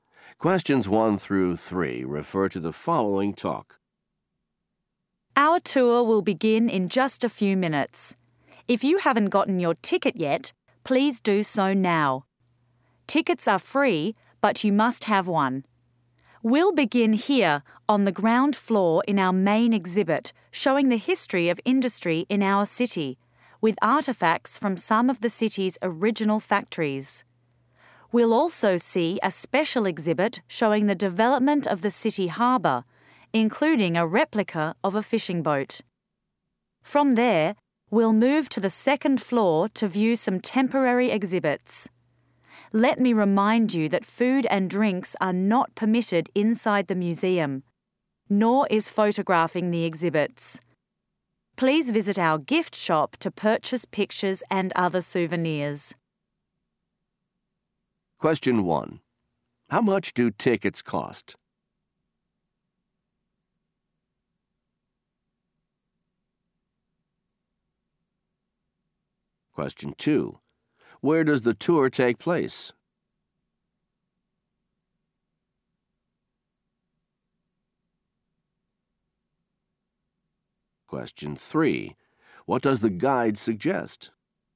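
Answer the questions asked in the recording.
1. They are free.
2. In a museum.
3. Visiting the gift shop to buy pictures and souvenirs.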